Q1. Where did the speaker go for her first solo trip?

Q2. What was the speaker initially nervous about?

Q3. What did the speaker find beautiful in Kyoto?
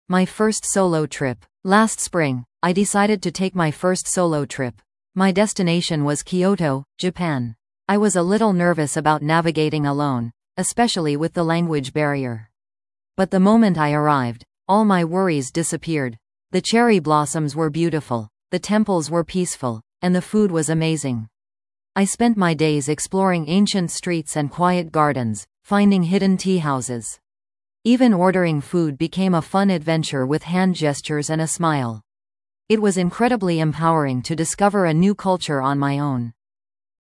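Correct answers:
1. Kyoto, Japan
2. Navigating alone, especially with the language barrier
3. The cherry blossoms

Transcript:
My First Solo Trip
Last spring, I decided to take my first solo trip. My destination was Kyoto, Japan. I was a little nervous about navigating alone, especially with the language barrier. But the moment I arrived, all my worries disappeared. The cherry blossoms were beautiful, the temples were peaceful, and the food was amazing. I spent my days exploring ancient streets and quiet gardens, finding hidden tea houses. Even ordering food became a fun adventure with hand gestures and a smile. It was incredibly empowering to discover a new culture on my own.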